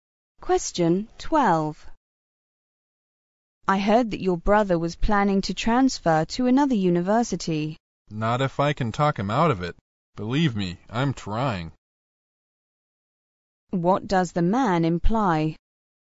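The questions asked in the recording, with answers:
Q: What does the man imply?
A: He is trying to persuade his brother not to transfer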